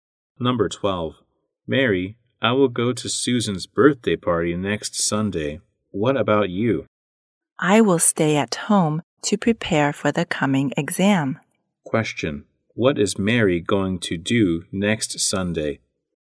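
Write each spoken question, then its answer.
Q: what is Mary going to do next Sunday?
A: Stay at home to prepare for the exam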